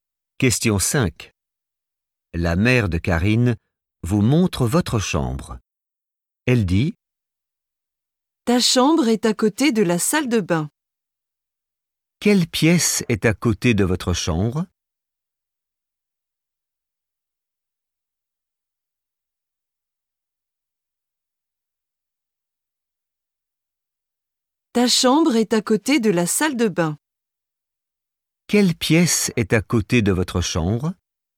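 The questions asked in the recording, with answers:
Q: Quelle pièce est à côté de votre chambre?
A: la salle de bain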